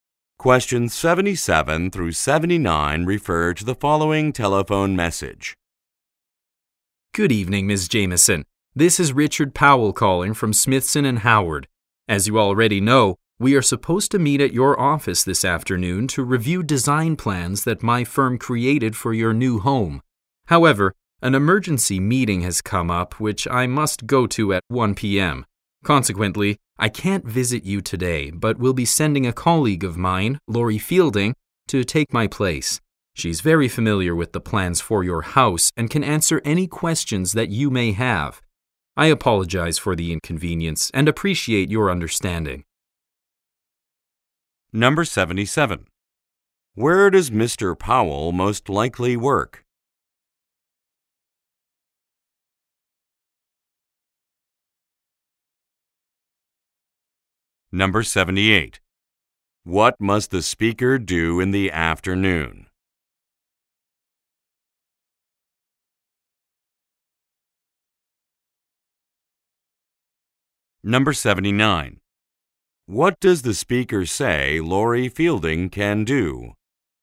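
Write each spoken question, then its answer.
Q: What must the speaker do in the afternoon?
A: Attend an emergency meeting

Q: What does the speaker say Lori Fielding can do?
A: Answer questions about the house plans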